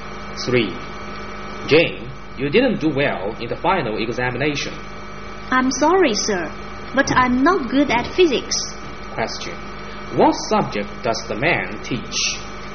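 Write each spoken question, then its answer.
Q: What subject does the man teach?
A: Physics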